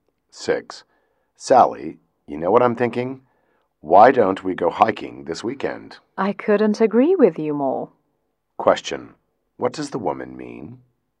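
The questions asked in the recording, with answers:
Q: what does the woman mean?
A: She agrees to go hiking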